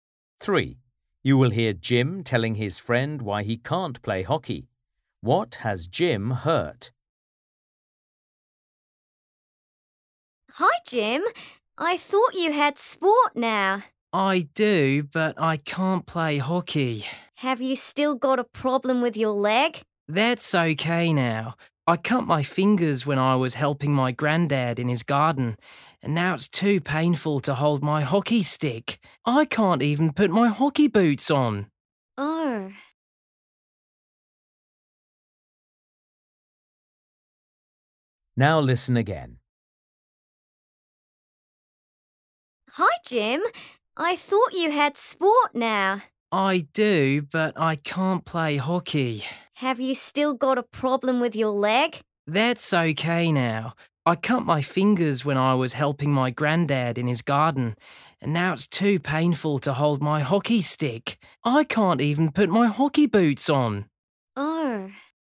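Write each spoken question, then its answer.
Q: What has Jim hurt?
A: his fingers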